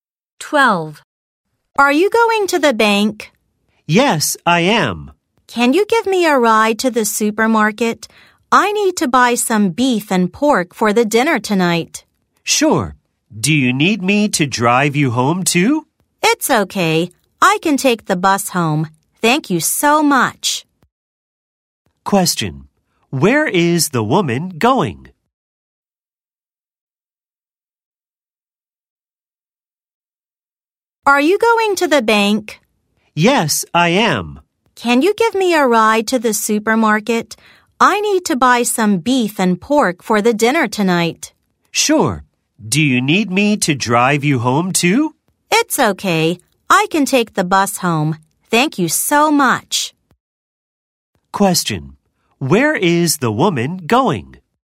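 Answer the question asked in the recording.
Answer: To the supermarket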